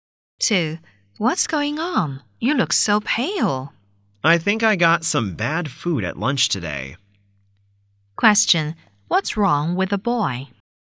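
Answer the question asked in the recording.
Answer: He got sick from bad food at lunch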